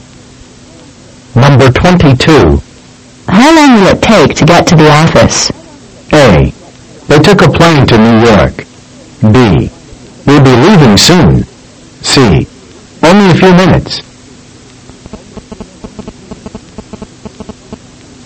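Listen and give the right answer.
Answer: C: Only a few minutes.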